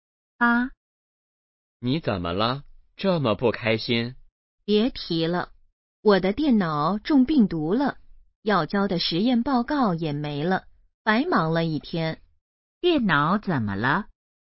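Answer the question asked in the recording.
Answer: 中病毒了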